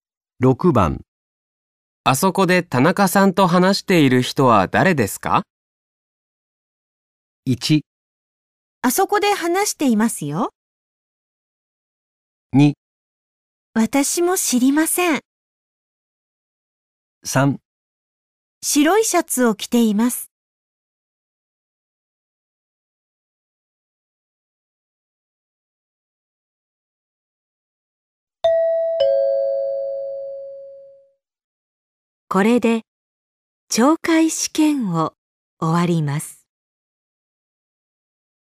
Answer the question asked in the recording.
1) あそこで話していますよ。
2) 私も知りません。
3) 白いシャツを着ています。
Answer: 2) 私も知りません。

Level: N5 Listening · Test 3